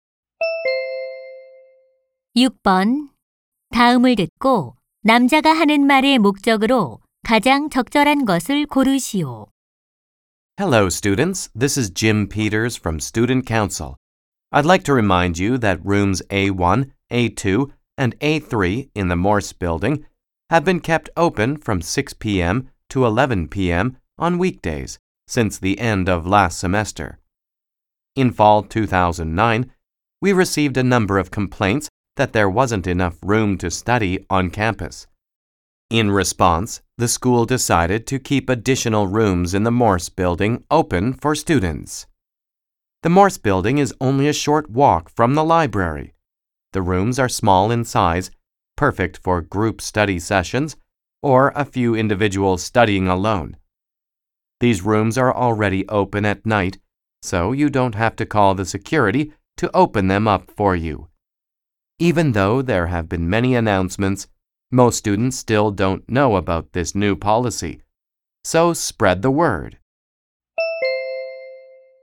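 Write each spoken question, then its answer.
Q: 다음을 듣고 남자가 하는 말의 목적으로 가장 적절한 것을 고르시오.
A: Morse 건물 강의실 야간 개방 안내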